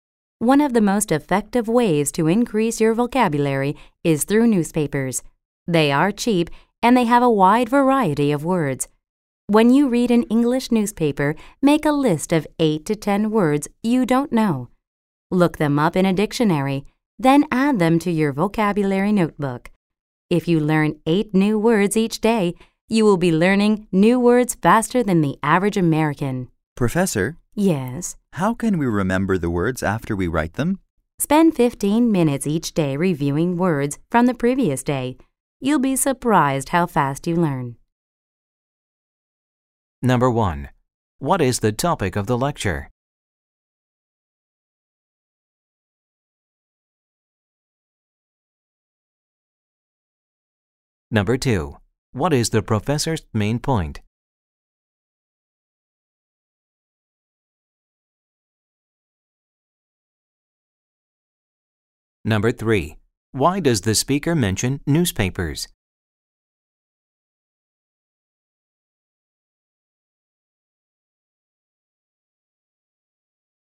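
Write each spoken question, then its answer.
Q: What is the topic of the lecture?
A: Increasing your vocabulary

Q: Why does the speaker mention newspapers?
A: They are cheap and have a wide variety of words, so they help build vocabulary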